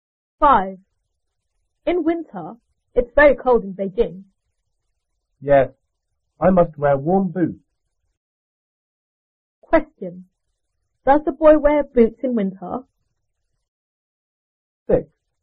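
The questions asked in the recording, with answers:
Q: Does the boy wear boots in winter?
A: Yes, warm boots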